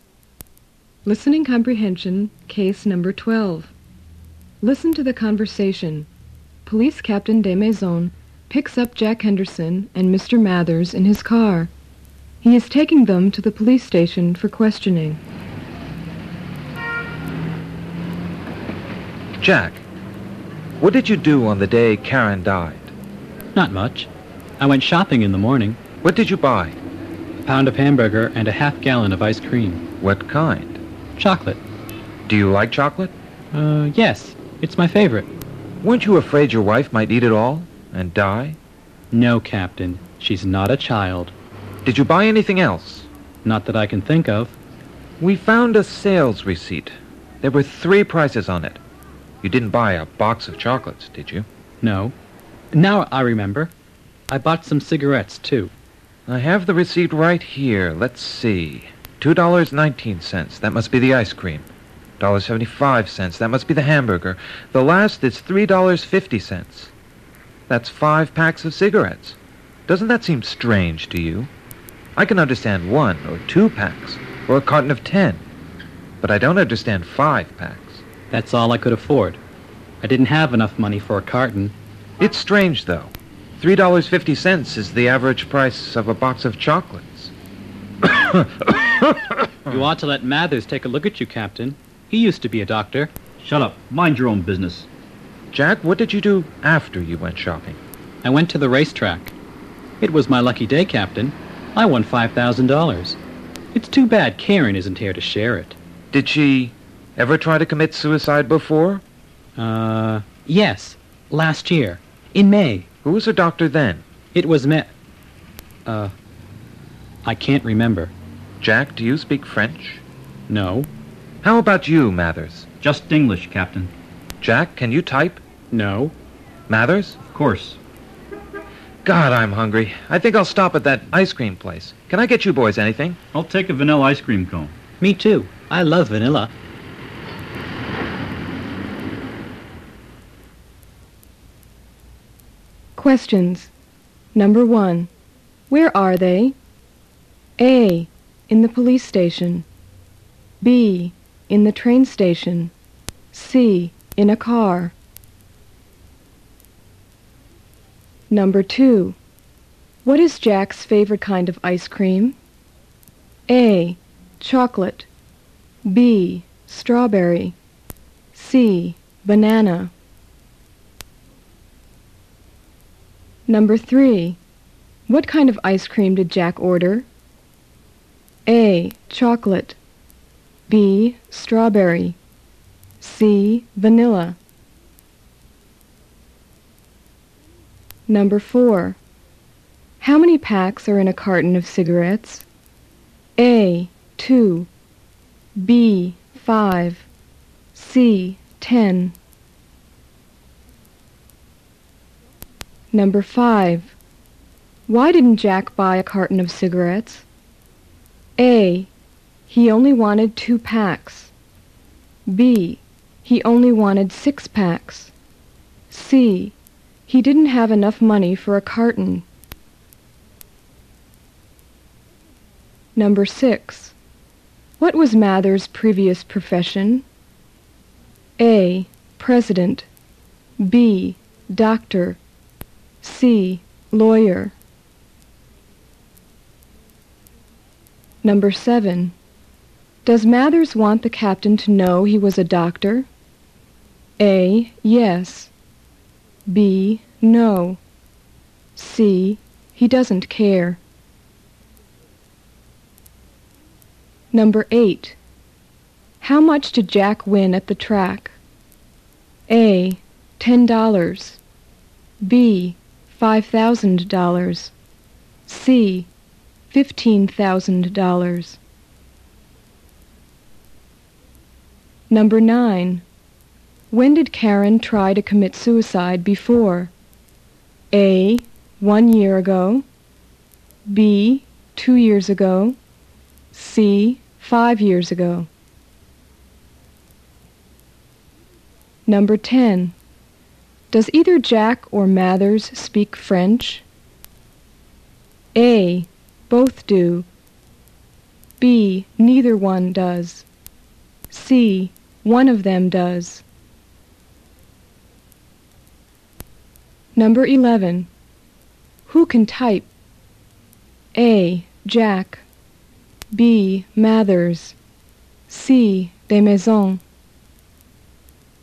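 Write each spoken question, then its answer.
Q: Where are they?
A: C: In a car.

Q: What is Jack's favorite kind of ice cream?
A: A: Chocolate.

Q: What kind of ice cream did Jack order?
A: C: Vanilla.

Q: How many packs are in a carton of cigarettes?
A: C: 10.

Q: Why didn't Jack buy a carton of cigarettes?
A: C: He didn't have enough money for a carton.

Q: What was Mathers' previous profession?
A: B: Doctor.

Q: How much did Jack win at the track?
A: B: $5,000.

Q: When did Karen try to commit suicide before?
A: A: 1 year ago.

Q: Does either Jack or Mathers speak French?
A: B: Neither one does.

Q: Who can type?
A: B: Mathers.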